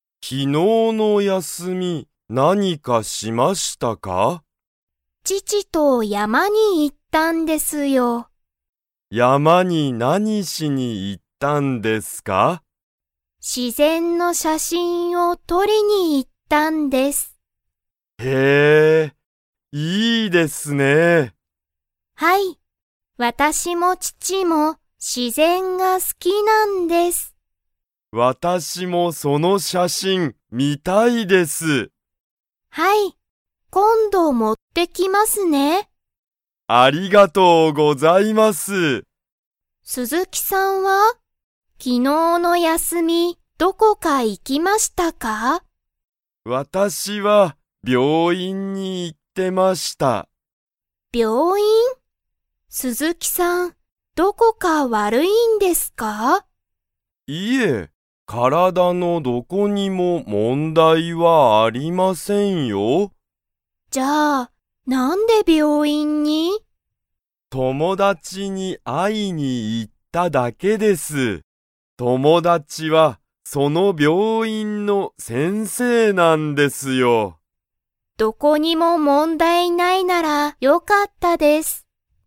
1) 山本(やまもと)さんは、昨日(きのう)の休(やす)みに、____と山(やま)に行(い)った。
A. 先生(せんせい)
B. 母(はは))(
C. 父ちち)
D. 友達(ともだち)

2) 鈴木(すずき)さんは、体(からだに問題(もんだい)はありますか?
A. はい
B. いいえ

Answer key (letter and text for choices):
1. C. 父ちち)
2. B. いいえ

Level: Level 2